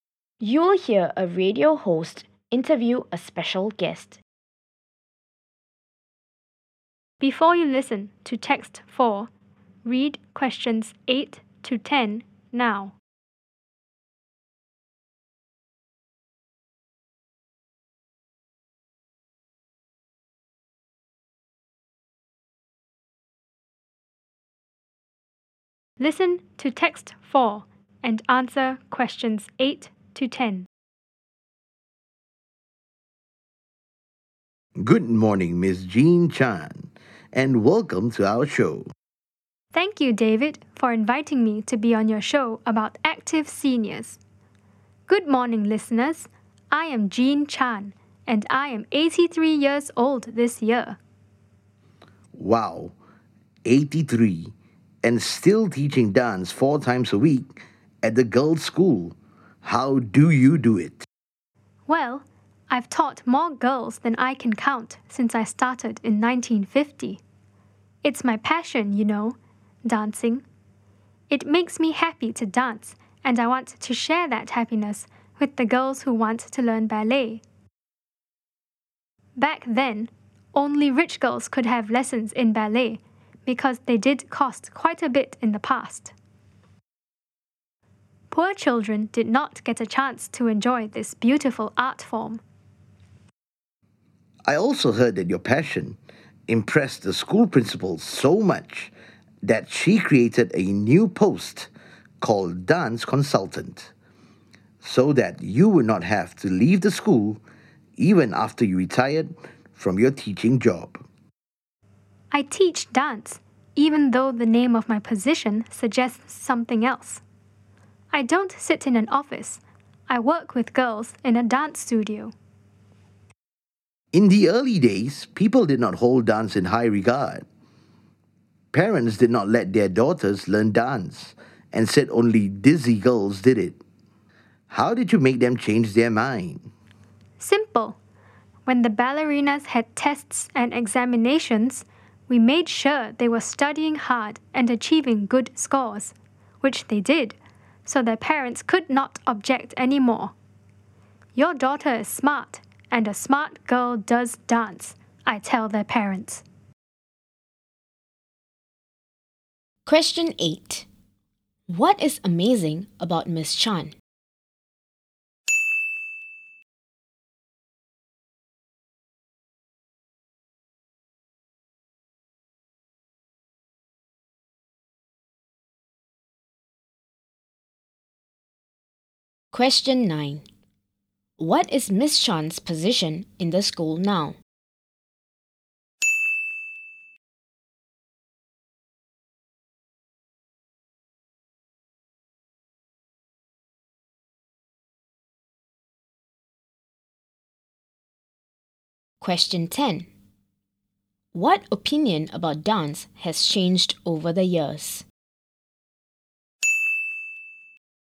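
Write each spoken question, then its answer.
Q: What is amazing about Ms. Chan?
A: She is 83 and still teaches dance four times a week

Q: What is Ms. Chan's position in the school now?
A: Dance Consultant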